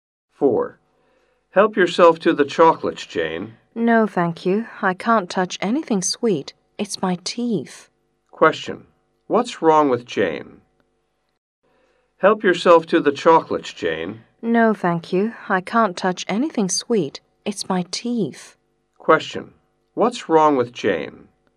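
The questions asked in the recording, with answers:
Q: What's wrong with Jane?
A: She has a problem with her teeth (toothache)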